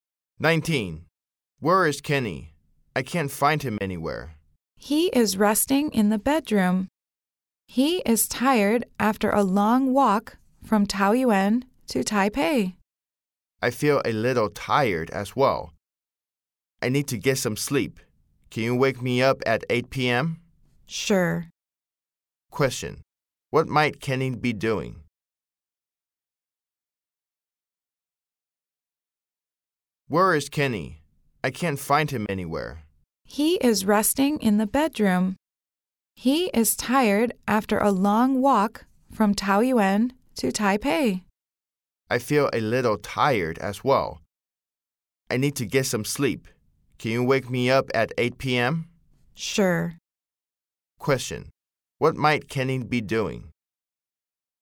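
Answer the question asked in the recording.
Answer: Resting in the bedroom.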